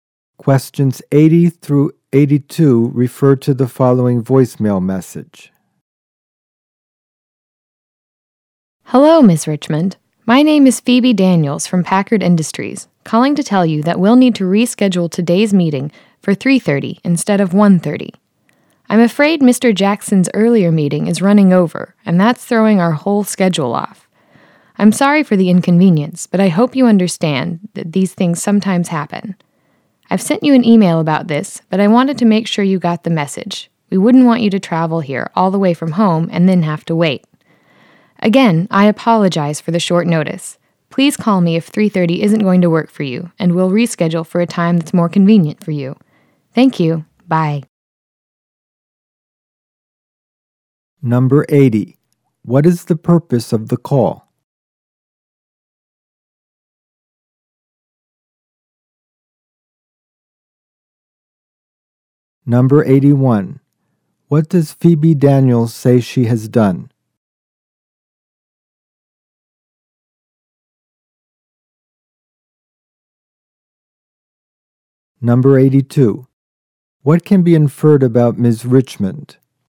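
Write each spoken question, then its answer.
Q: What is the purpose of the call?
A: To reschedule a meeting to 3:30

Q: What does Phoebe Daniels say she has done?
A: Sent an email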